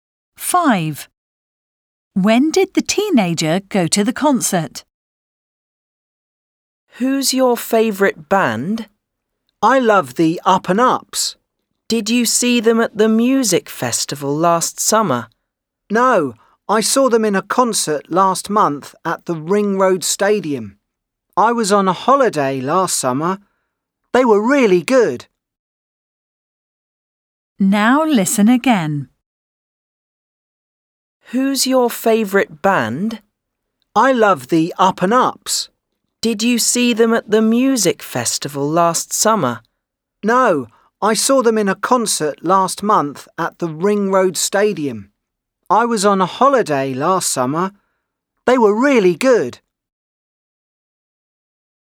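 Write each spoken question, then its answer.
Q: When did the teenager go to the concert?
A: last month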